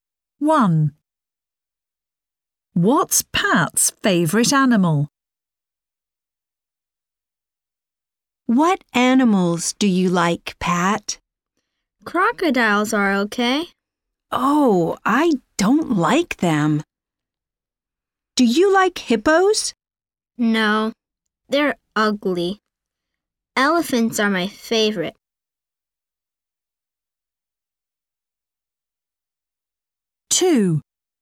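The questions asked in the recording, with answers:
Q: What's Pat's favourite animal?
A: Elephants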